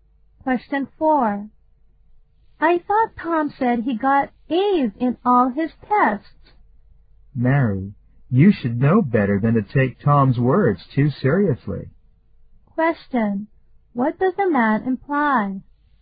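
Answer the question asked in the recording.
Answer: Tom's words can't be trusted.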